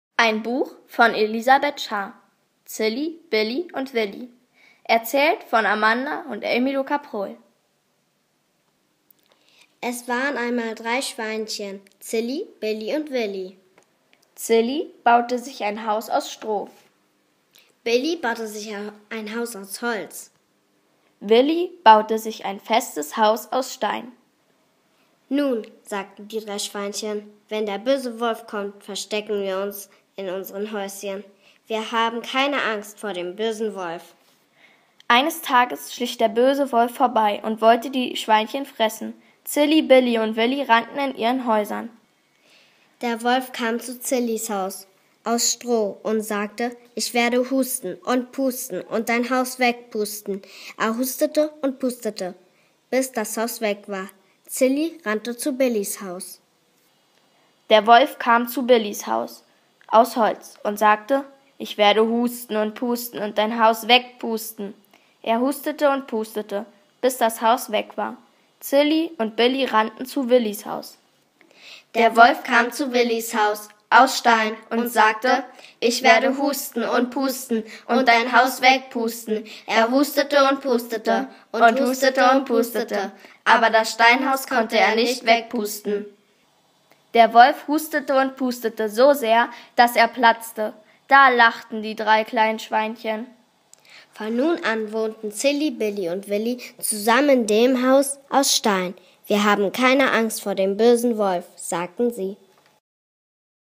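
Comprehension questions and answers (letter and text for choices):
Klikni na na modrý link hore. Pozorne počúvaj nahrávku a po vypočutí nahrávky vyber správne odpovede.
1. Wer baute sich ein festes Haus aus Stein ?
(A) Bellie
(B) Sellie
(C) Wellie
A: (C) Wellie

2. Wer kam vorbei?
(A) Wolf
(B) Tiger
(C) Bär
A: (A) Wolf

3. Was machte der Wolf um die Häuser zu zerstoeren?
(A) pusten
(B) husten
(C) putzen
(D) duzen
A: (A) pusten

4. Welches Haus hat das Pusten ausgehalten?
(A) Haus aus Stroh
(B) Haus aus Stein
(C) Haus aus Holz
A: (B) Haus aus Stein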